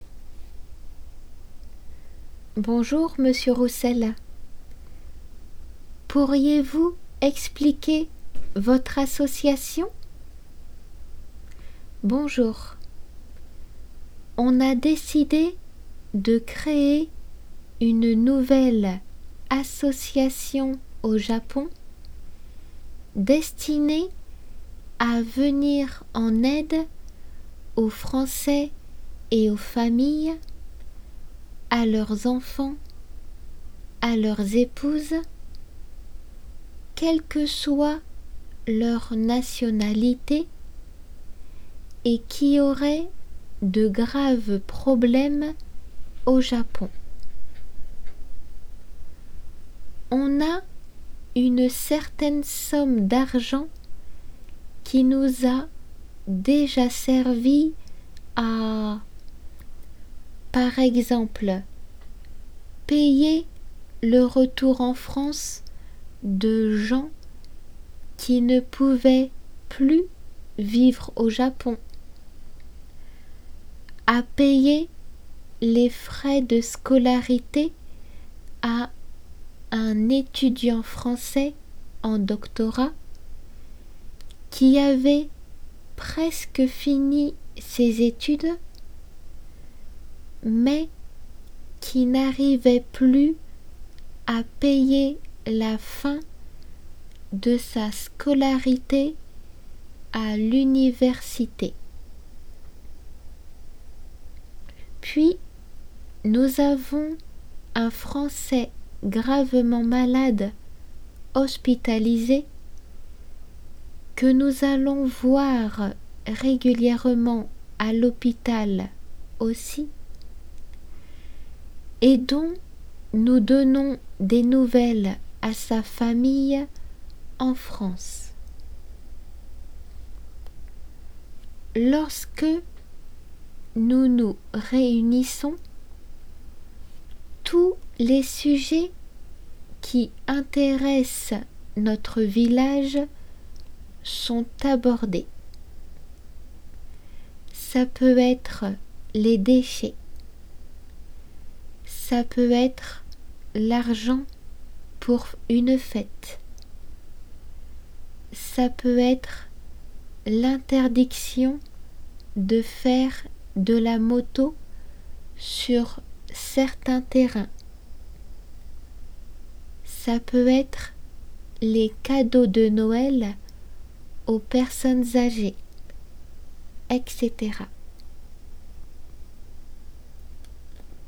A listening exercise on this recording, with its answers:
読まれるテキストをもう一度聞きながら 空欄を埋めて答えを完成しなさい。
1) Elle a pour but de venir ( ) ( ) aux Franςais qui auraient de graves problèmes au Japon.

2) Elle a offert des aides financières qui ont servi à payer le retour en France de gens qui ne pouvaient plus vivre au Japon, à ( ) ( ) ( ) de scolarité à l'université à un étudiant français.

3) lls vont voir régulièrement à l'hôpital un français gravement malade dont ils donnent des nouvelles à sa ( ) en ( ).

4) On discute des ( ), de l'argents pour une fête, de l'interdiction de faire de la moto sur certains terrains, des cadeaux de Noël aux personnes âgées, etc.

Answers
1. en aide
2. payer les frais
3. famille France
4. déchets